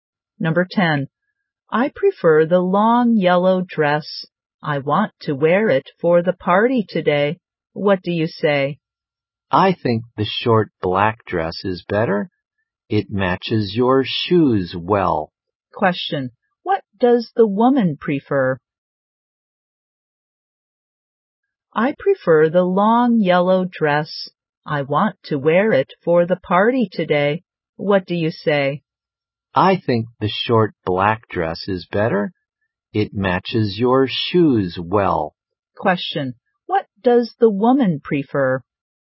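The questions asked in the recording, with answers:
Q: Question. What does the woman prefer?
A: The long yellow dress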